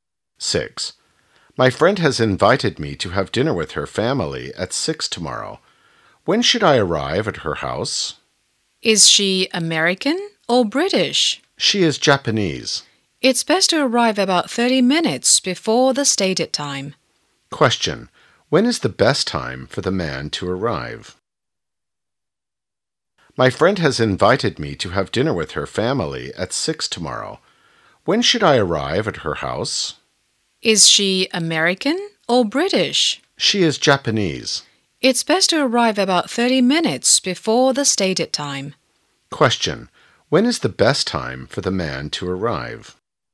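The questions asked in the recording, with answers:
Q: When is the best time for the man to arrive?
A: At about 5:30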